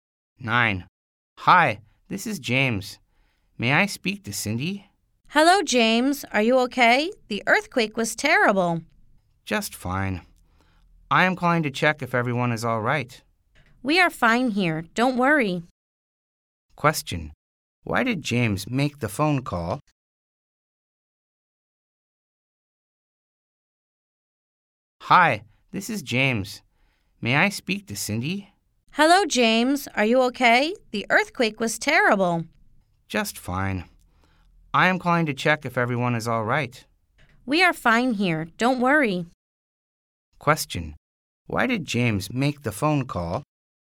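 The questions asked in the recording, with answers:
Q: Why did James make the phone call?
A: To check if everyone was all right after the earthquake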